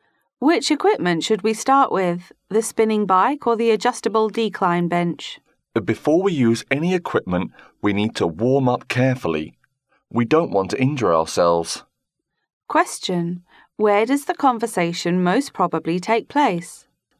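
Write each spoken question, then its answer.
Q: Where does the conversation most probably take place?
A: In a gym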